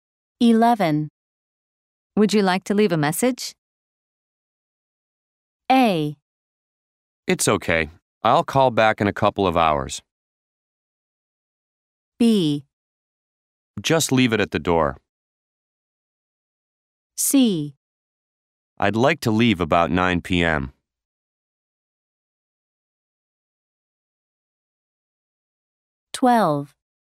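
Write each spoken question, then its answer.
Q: Would you like to leave a message?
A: A: It's okay. I'll call back in a couple of hours.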